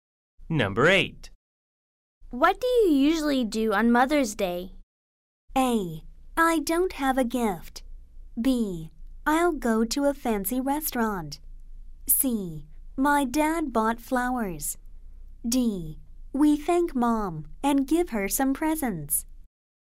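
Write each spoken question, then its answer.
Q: What do you usually do on Mother's Day?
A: D: We thank Mom and give her some presents.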